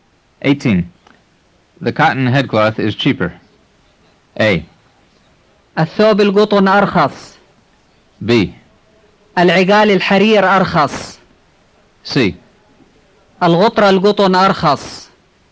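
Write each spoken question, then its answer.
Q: The cotton headcloth is cheaper.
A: C: الغطرة القطن أرخص.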